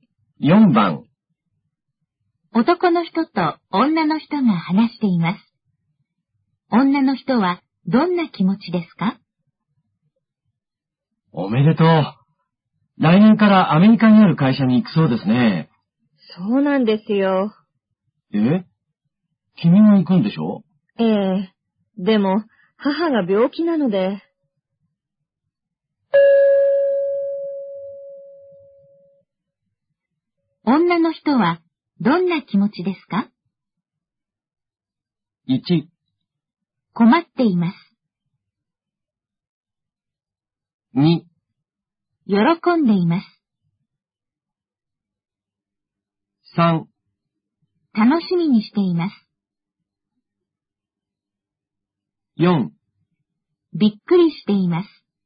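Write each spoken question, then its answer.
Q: 女の人はどんな気持ちですか?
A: 1: 困っています。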